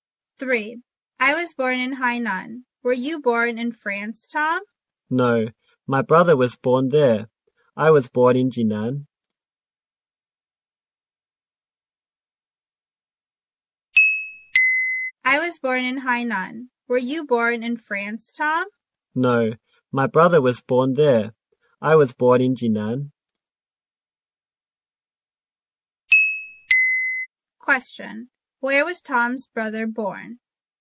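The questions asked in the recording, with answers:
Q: Where was Tom's brother born?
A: In France.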